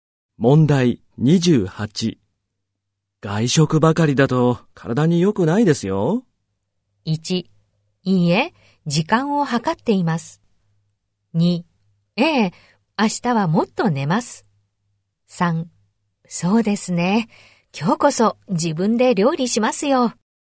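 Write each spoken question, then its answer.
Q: 外食ばかりだと体に良くないですよ。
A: 3: そうですね。今日こそ自分で料理しますよ。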